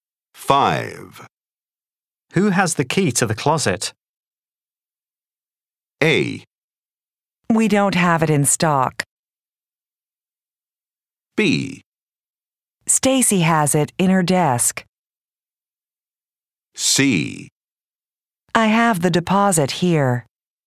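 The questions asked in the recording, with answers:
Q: Who has the key to the closet?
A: B: Stacy has it in her desk.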